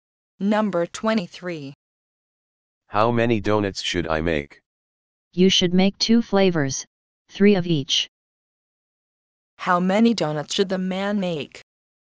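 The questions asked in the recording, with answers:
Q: How many donuts should the man make?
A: Six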